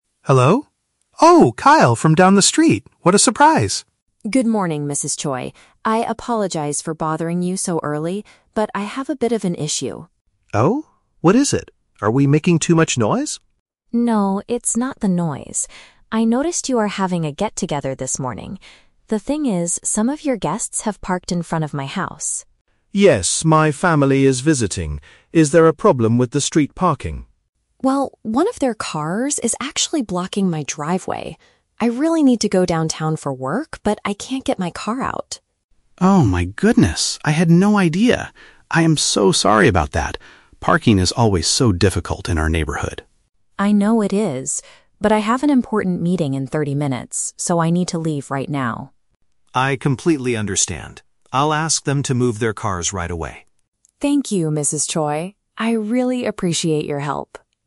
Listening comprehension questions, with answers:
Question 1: What is the main problem the man is facing?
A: He cannot drive his car to the office.

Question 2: Why is the car blocking the driveway?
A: The neighbor's visitors parked in the wrong place.

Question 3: What will Mrs. Choi do next?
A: She will request her guests to relocate their vehicles.

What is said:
Mrs. Choi: Hello? Oh, Kyle from down the street! What a surprise.
Kyle: Good morning, Mrs. Choi. I apologize for bothering you so early, but I have a bit of an issue.
Mrs. Choi: Oh? What is it? Are we making too much noise?
Kyle: No, it's not the noise. I noticed you are having a get-together this morning. The thing is, some of your guests have parked in front of my house.
Mrs. Choi: Yes, my family is visiting. Is there a problem with the street parking?
Kyle: Well, one of their cars is actually blocking my driveway. I really need to go downtown for work, but I can't get my car out.
Mrs. Choi: Oh my goodness, I had no idea! I am so sorry about that. Parking is always so difficult in our neighborhood.
Kyle: I know it is. But I have an important meeting in 30 minutes, so I need to leave right now.
Mrs. Choi: I completely understand. I'll ask them to move their cars right away.